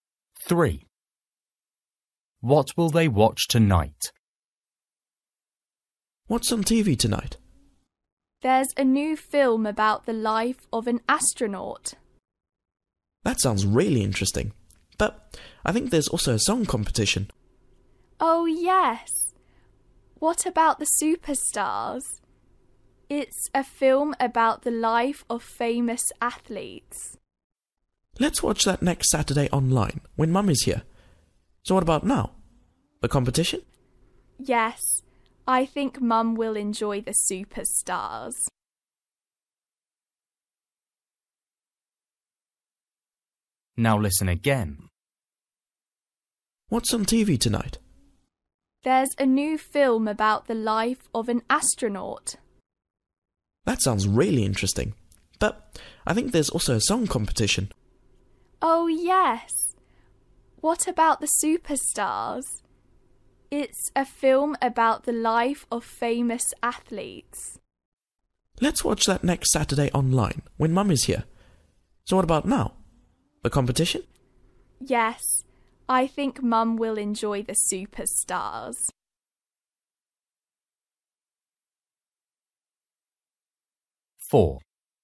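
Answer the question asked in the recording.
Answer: the song competition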